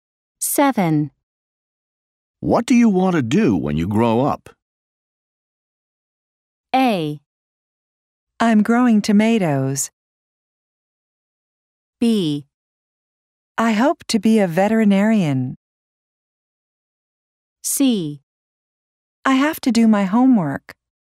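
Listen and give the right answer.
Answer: B: I hope to be a veterinarian.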